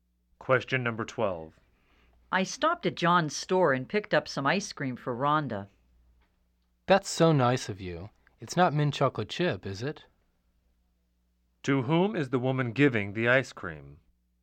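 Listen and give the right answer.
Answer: Rhonda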